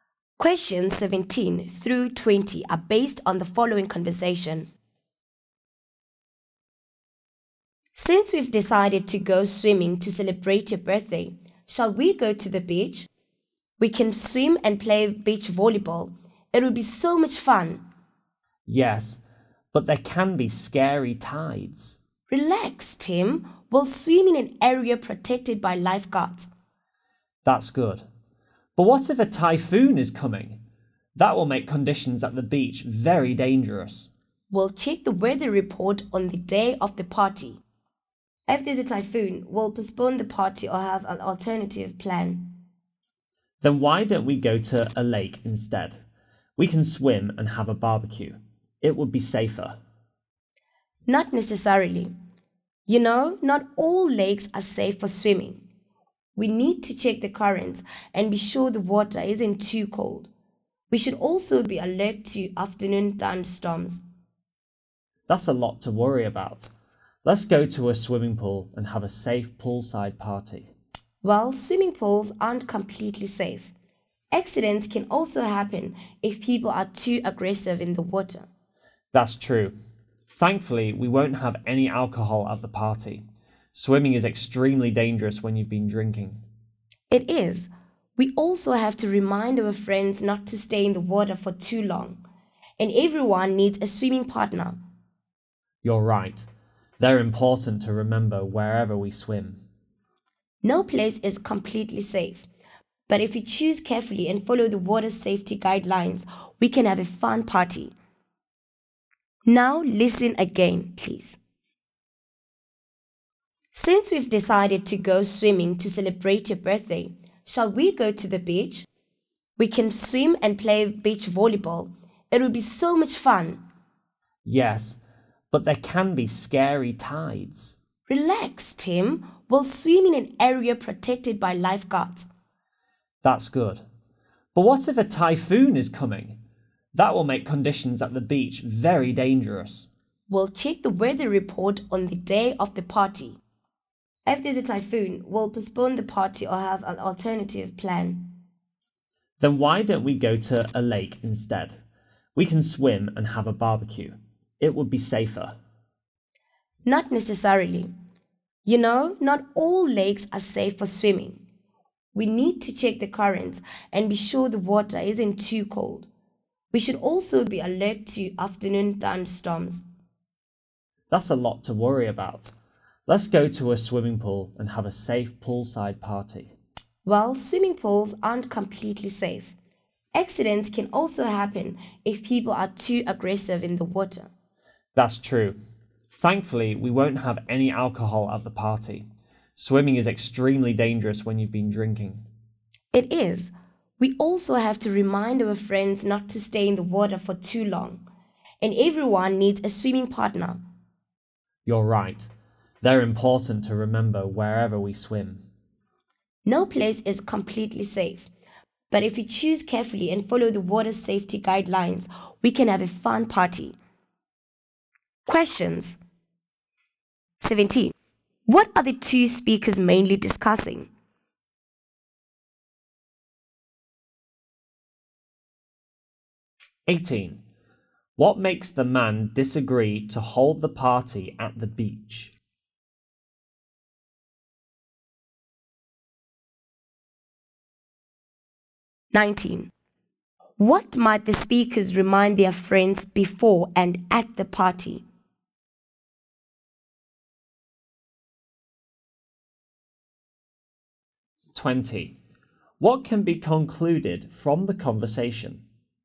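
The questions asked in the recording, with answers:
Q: What are the two speakers mainly discussing?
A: Where to hold a safe swimming birthday party

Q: What might the speakers remind their friends before and at the party?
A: Not to stay in the water too long and to have a swimming partner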